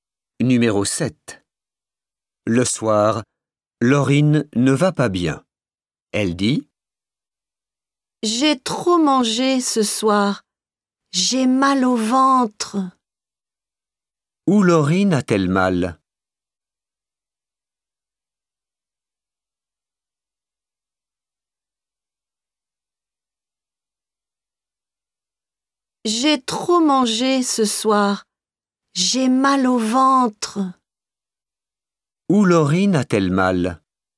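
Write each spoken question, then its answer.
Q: Où Laurine a-t-elle mal?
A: au ventre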